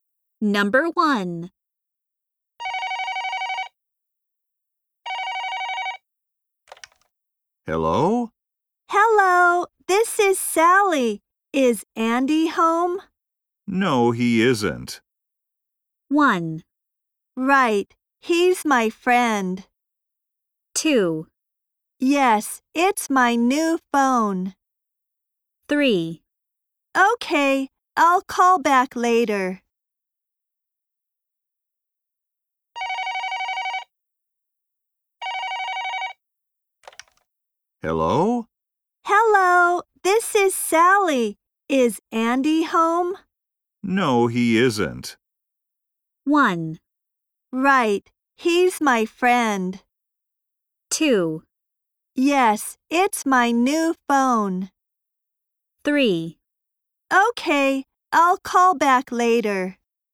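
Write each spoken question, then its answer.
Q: No, he isn't.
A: 3: Okay, I'll call back later.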